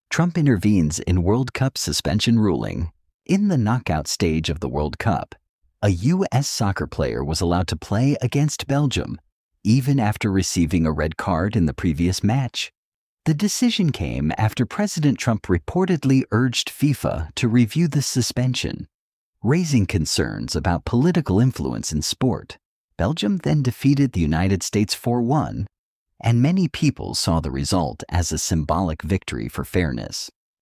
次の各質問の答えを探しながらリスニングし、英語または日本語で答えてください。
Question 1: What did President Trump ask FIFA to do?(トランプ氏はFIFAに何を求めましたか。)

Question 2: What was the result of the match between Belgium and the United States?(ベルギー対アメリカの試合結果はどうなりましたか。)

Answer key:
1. He reportedly urged FIFA to review the suspension.
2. Belgium defeated the United States 4-1.

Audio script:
Trump Intervenes in World Cup Suspension Ruling
In the knockout stage of the World Cup, a U.S. soccer player was allowed to play against Belgium, even after receiving a red card in the previous match.
The decision came after President Trump reportedly urged FIFA to review the suspension, raising concerns about political influence in sport.
Belgium then defeated the United States 4-1, and many people saw the result as a symbolic victory for fairness.